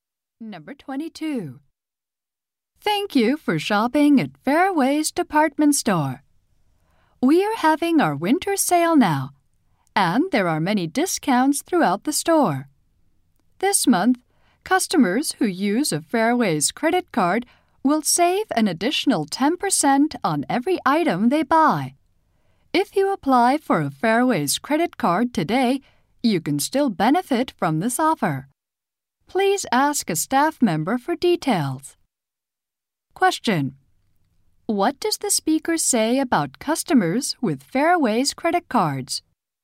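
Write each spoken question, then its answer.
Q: What does the speaker say about customers with Fairways credit cards?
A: They save an additional 10% on every item this month.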